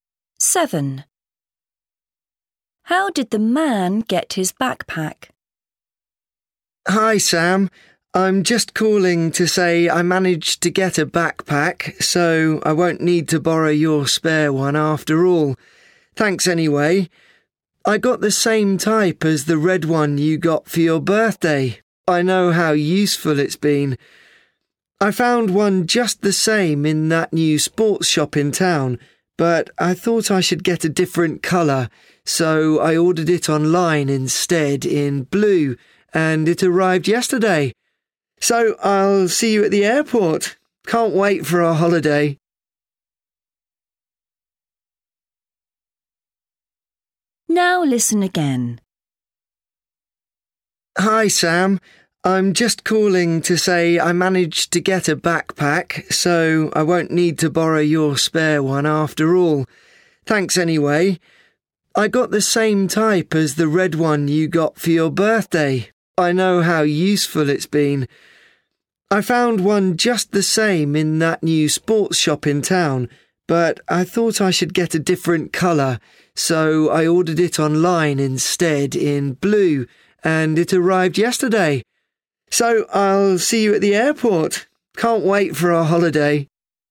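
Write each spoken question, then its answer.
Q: How did the man get his backpack?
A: he ordered it online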